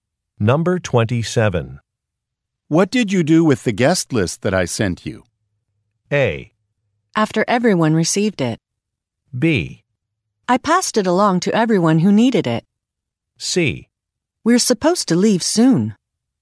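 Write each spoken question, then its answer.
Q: What did you do with the guest list that I sent you?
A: B: I passed it along to everyone who needed it.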